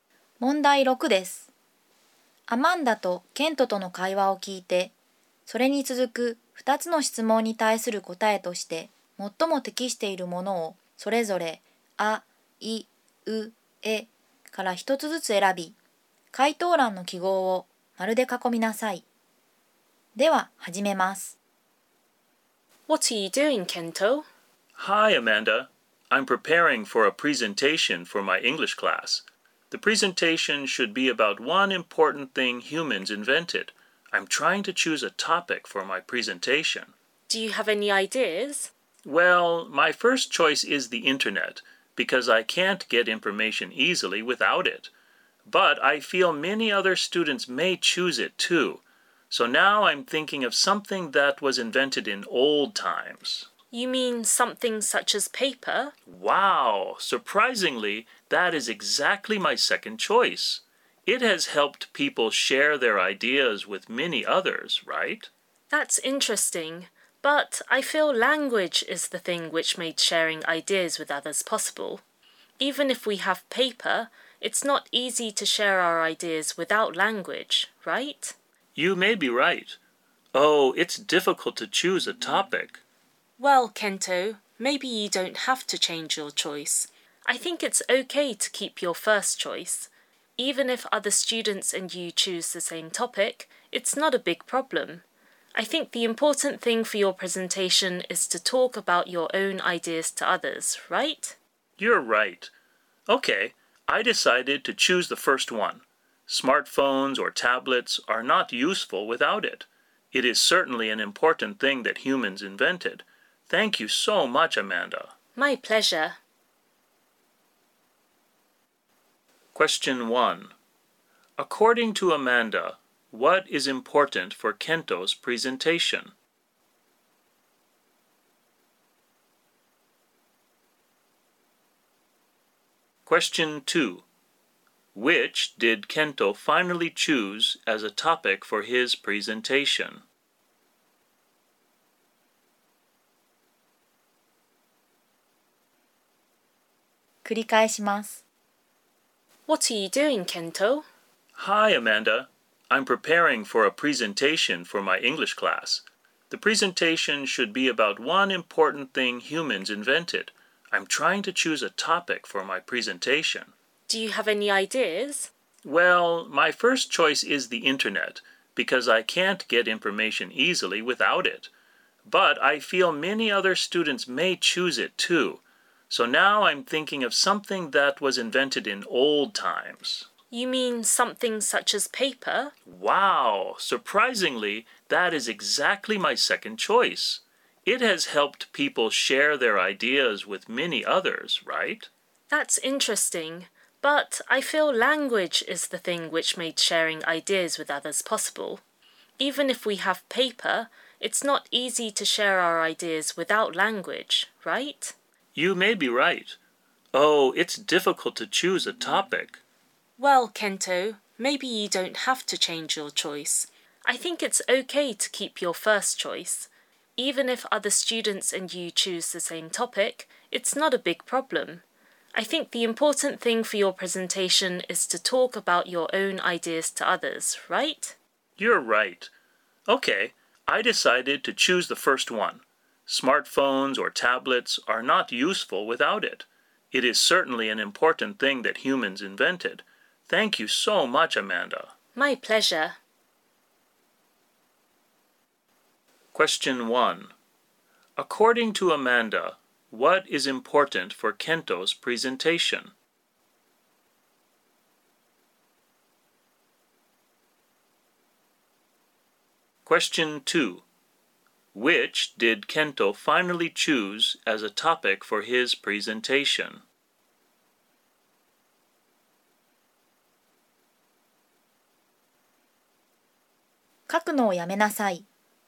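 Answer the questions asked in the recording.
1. To talk about his own ideas to others.
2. The internet.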